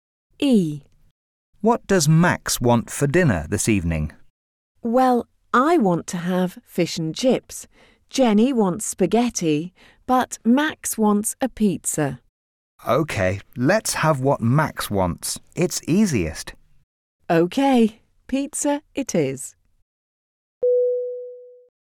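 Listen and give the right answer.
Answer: Pizza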